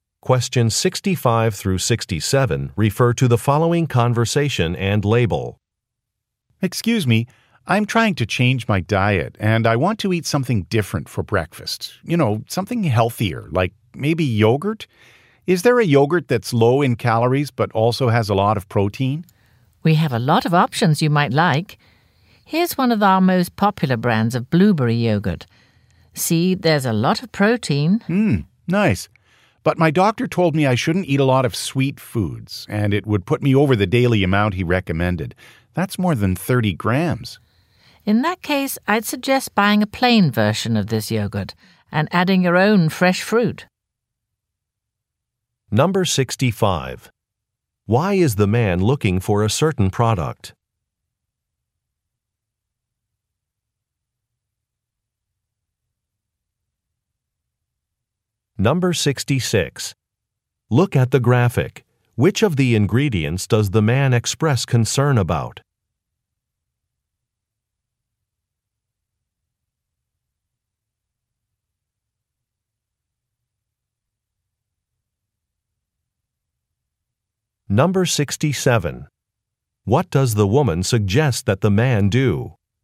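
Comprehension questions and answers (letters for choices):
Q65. Why is the man looking for a certain product?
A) He wants to eat healthy foods.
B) He is allergic to a particular ingredient.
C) He has a coupon for a discount.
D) He has a favorite brand.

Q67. What does the woman suggest that the man do?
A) Try a free sample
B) Go to a larger branch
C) Speak with his doctor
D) Purchase a different item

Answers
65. A
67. D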